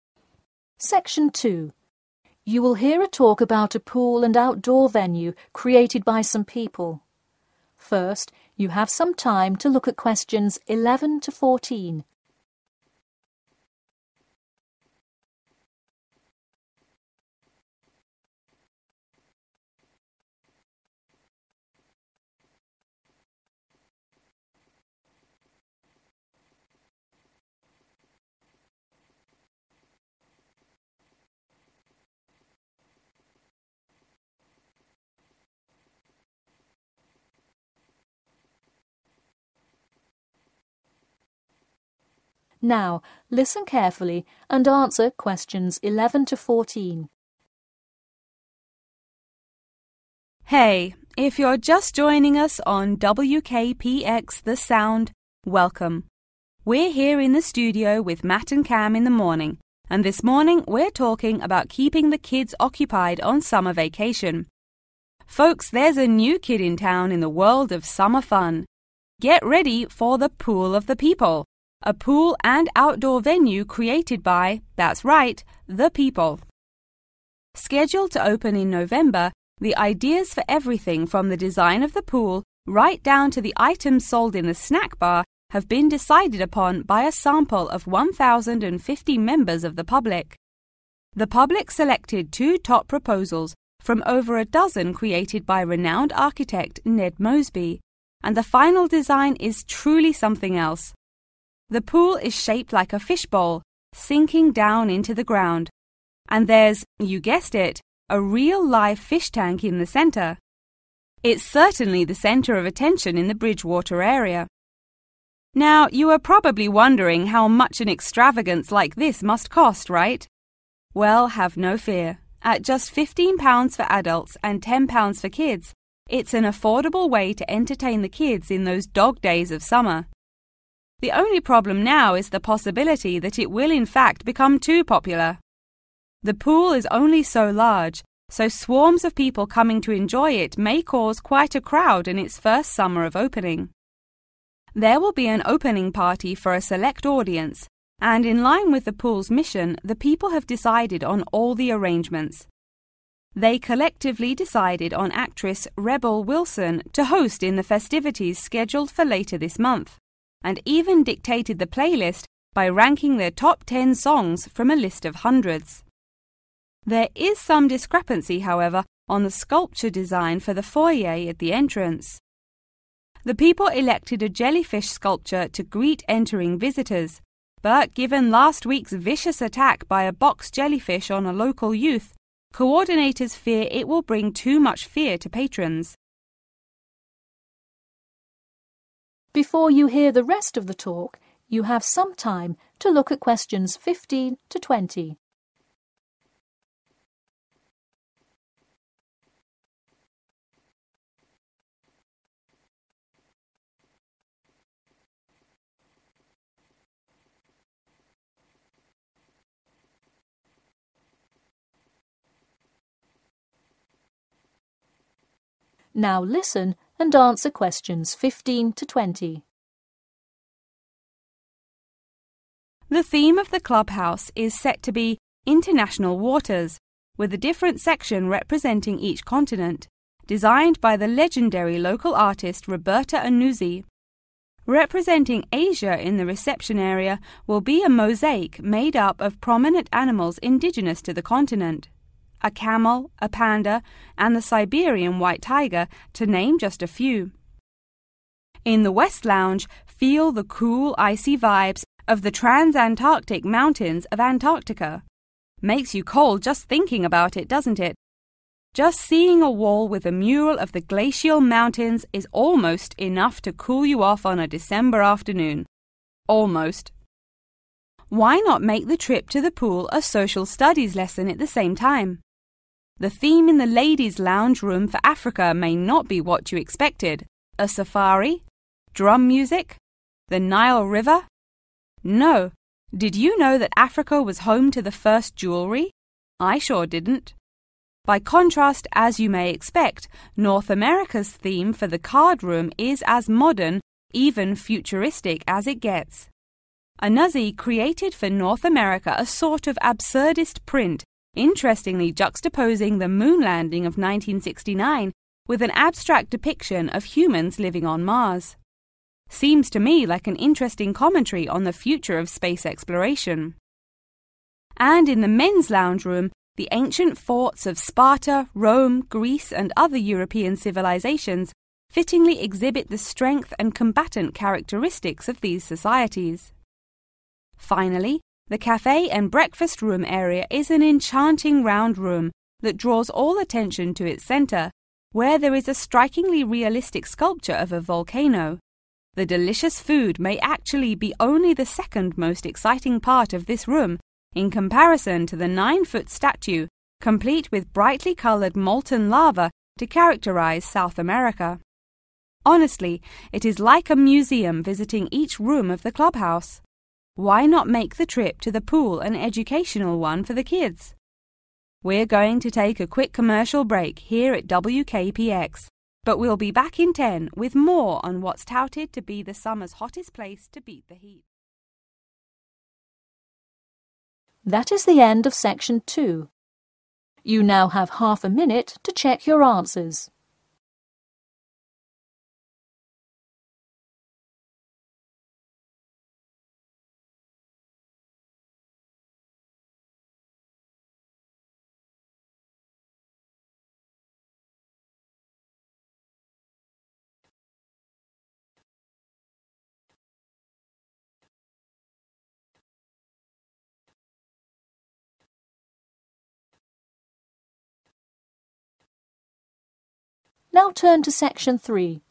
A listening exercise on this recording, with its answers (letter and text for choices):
Choose the correct letter, A, B or C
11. The top two proposals for the design of the swimming pool were chosen by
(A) the public.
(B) the radio station.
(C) architects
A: (A) the public.

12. What is special about the pool's construction?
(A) It was constructed by the people.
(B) Its fishbowl-like shape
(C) It is the first pool in Bridgewater.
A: (B) Its fishbowl-like shape

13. News reports covering the new pool expressed concerns over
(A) price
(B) safety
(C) size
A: (C) size

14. What factor of the pool's Grand Opening remains undecided?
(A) who will host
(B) the exact opening time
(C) what sculpture will be in the foyer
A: (C) what sculpture will be in the foyer

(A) film and music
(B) mountains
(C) space travel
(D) jewelry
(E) animals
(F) waterways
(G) volcano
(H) ancient forts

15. Asia..............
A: (E) animals

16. Antarctica..............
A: (B) mountains

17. Africa..............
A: (D) jewelry

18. North America..............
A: (C) space travel

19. Europe..............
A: (H) ancient forts

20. South America..............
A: (G) volcano